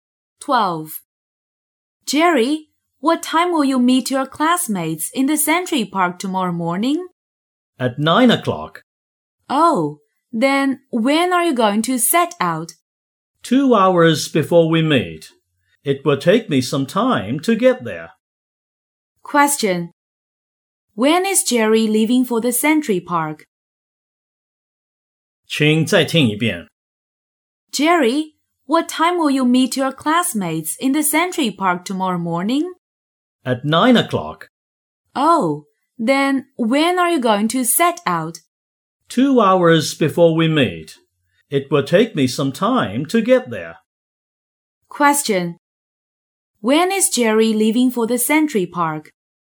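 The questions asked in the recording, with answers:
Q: When is Jerry leaving for the Century Park?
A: At 7 o'clock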